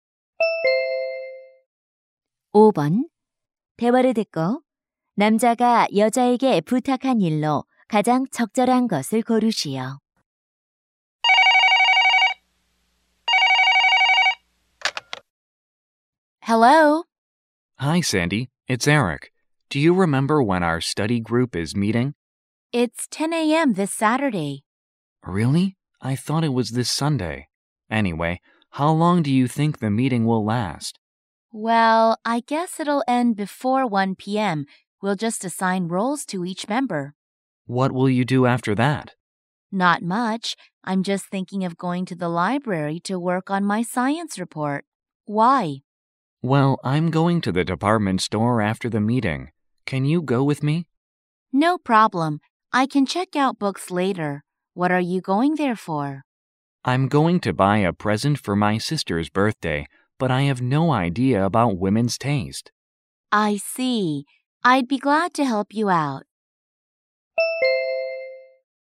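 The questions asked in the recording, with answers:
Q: 대화를 듣고 남자가 여자에게 부탁한 일로 가장 적절한 것을 고르시오.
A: 여동생 생일 선물 사는 데 같이 가 주기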